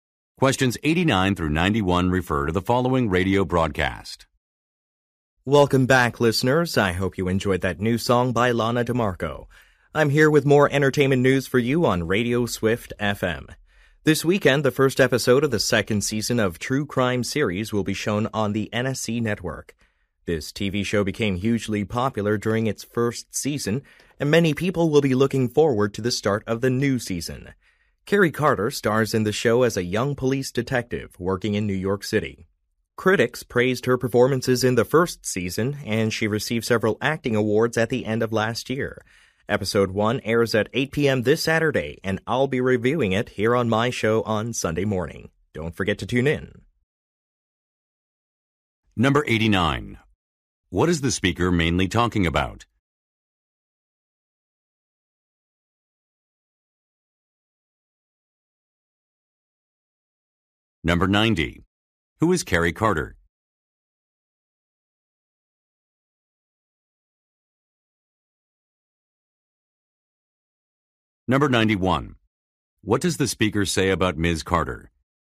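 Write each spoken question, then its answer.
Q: What is the speaker mainly talking about?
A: The new season of a TV show (True Crime)

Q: Who is Carrie Carter?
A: An actress who stars in the show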